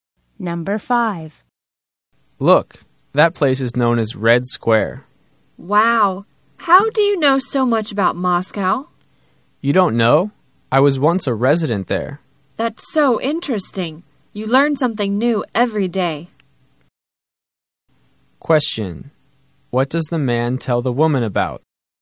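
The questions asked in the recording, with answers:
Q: What does the man tell the woman about?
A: Moscow, where he once lived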